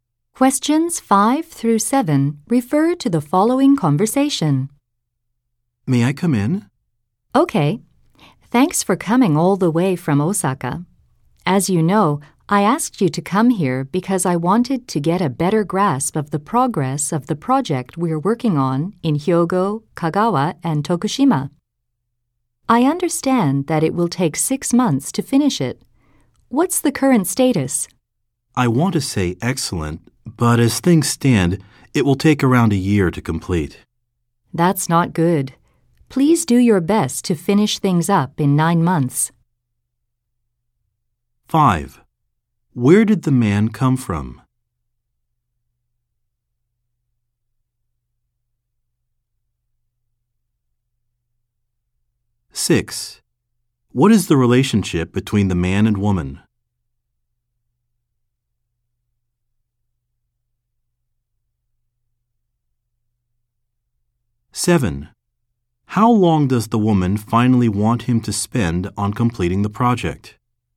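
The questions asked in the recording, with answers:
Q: Where did the man come from?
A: Osaka

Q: How long does the woman finally want him to spend on completing the project?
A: 9 months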